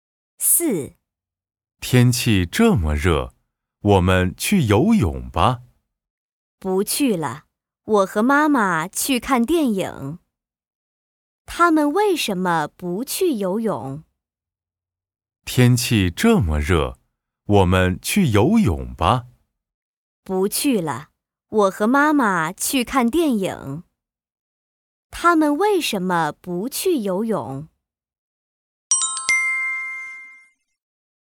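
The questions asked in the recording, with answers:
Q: 他们为什么不去游泳?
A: 要和妈妈去看电影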